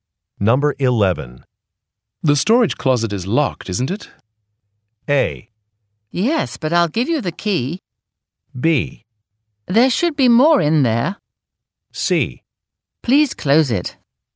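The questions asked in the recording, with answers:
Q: The storage closet is locked, isn't it?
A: A: Yes, but I'll give you the key.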